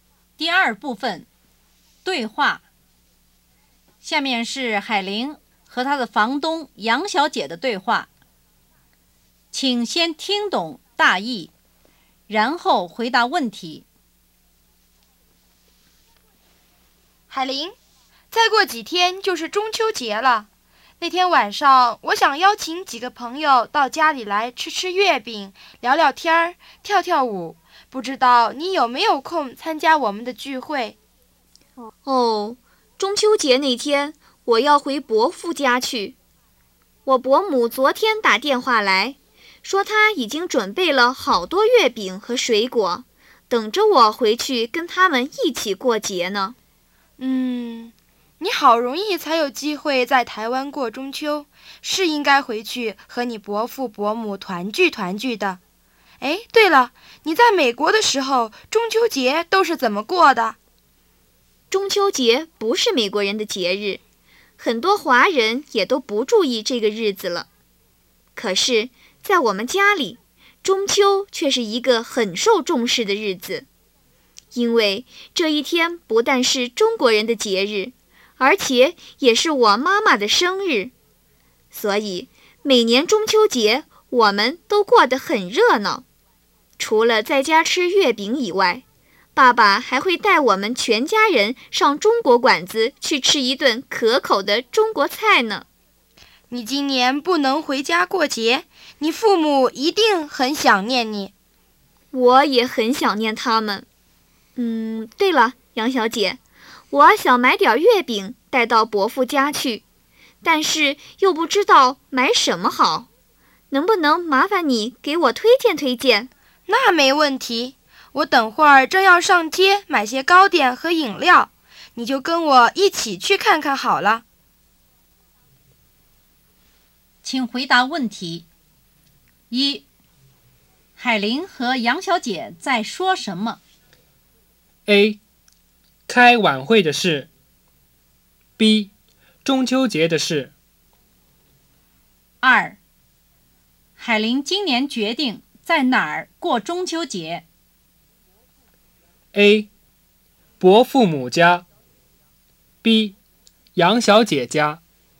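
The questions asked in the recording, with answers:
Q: 海玲今年决定在哪儿过中秋节?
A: A: 伯父母家。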